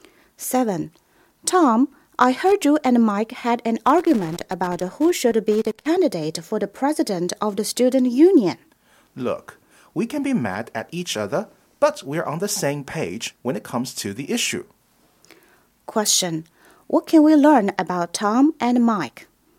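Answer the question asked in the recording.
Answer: They agree on the candidate issue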